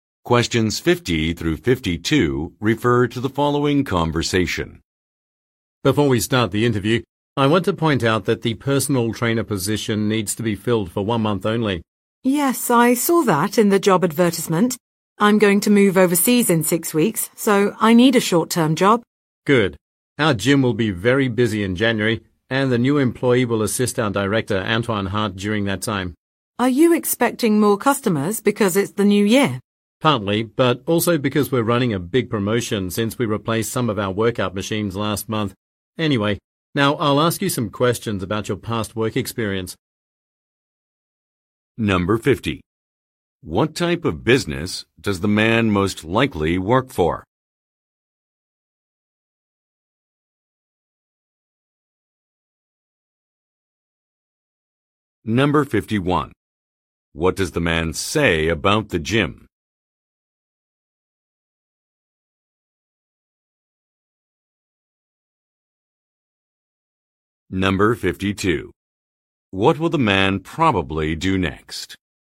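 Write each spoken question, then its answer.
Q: What type of business does the man most likely work for?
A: A gym (fitness center)

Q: What will the man probably do next?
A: Ask about the woman's past work experience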